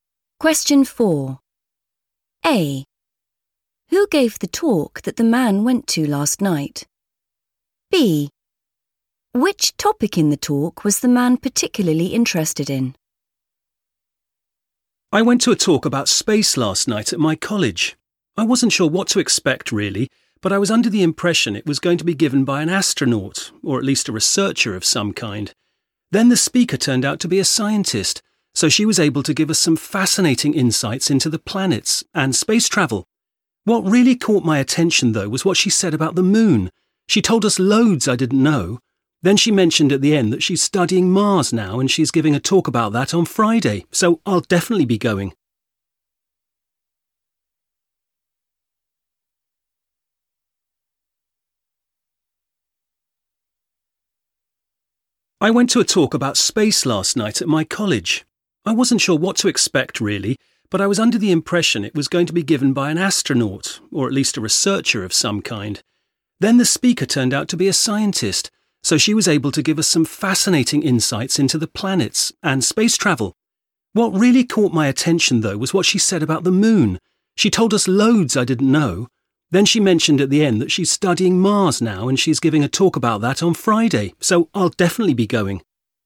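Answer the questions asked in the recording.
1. a scientist
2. the moon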